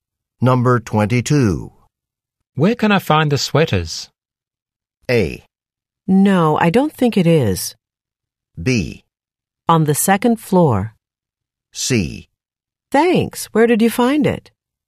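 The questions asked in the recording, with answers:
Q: Where can I find the sweaters?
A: B: On the second floor.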